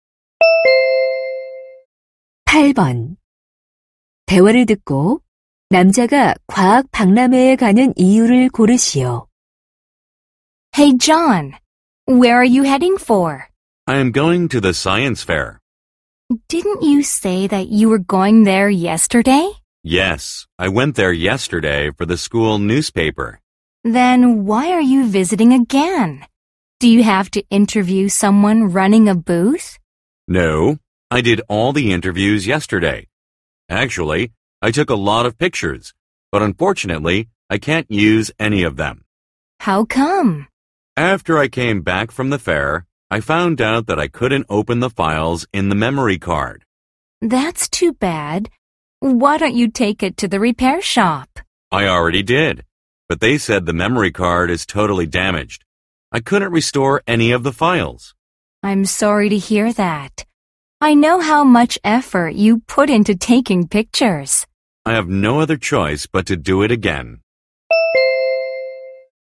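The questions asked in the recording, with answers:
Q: 대화를 듣고 남자가 과학 박람회에 가는 이유를 고르시오.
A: 사진을 다시 찍기 위해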